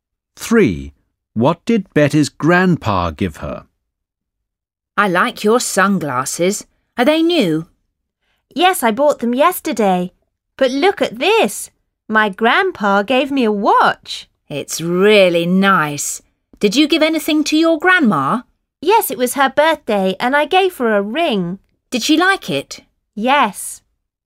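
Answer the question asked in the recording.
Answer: A watch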